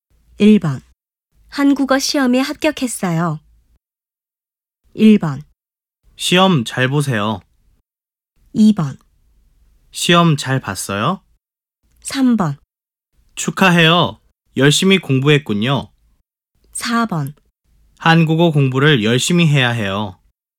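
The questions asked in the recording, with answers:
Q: 한국어 시험에 합격했어요.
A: 3: 축하해요. 열심히 공부했군요.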